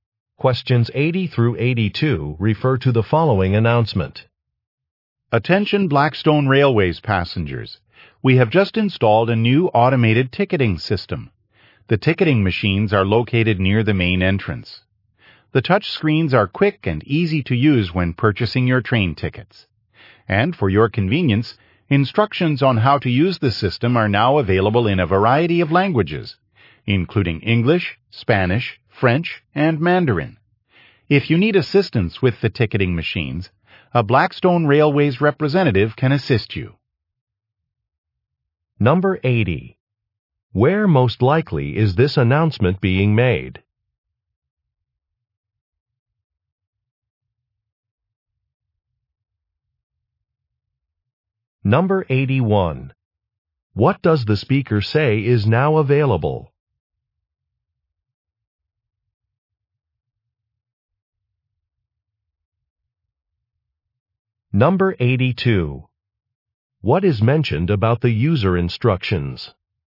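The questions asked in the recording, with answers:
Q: Where most likely is this announcement being made?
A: At a train station

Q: What does the speaker say is now available?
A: A new automated ticketing system

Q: What is mentioned about the user instructions?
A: They are available in several languages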